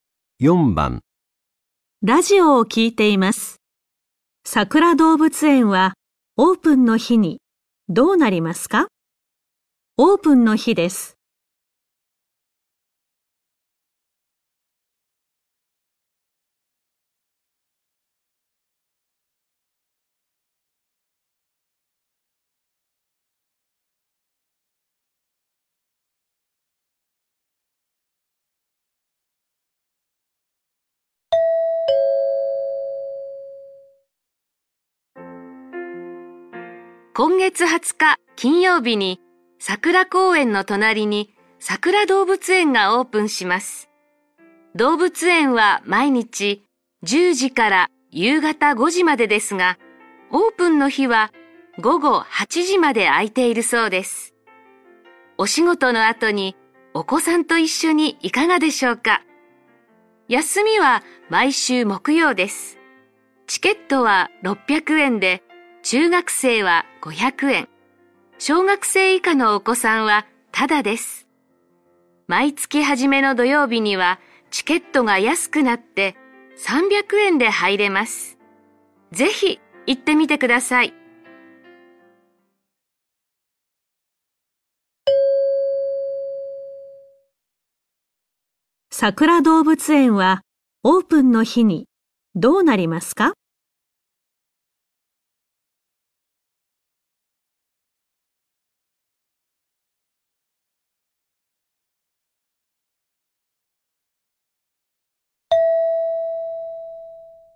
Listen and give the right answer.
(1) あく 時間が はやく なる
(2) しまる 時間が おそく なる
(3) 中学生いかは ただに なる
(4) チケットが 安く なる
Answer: (2) しまる 時間が おそく なる

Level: N4 Listening · Test 1